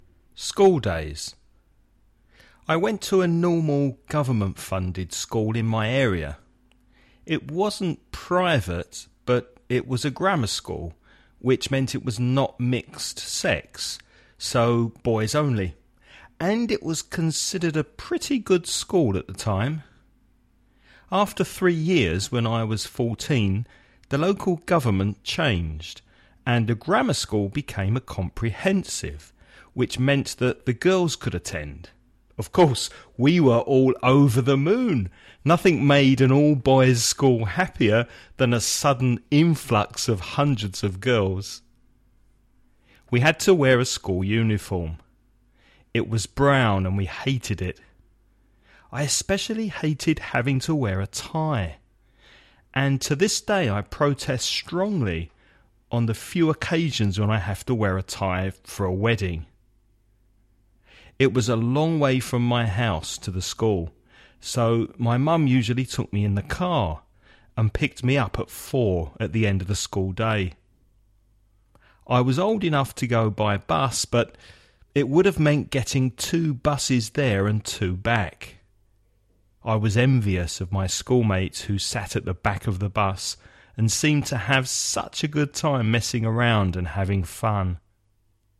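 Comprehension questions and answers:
Now listen and answer the questions.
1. Was the man's school a private school?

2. How old was the man when girls arrived at the school?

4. What colour was the school uniform?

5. How did he get to school?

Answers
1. No, it was a government-funded grammar school.
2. 14
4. Brown
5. His mum usually took him in the car.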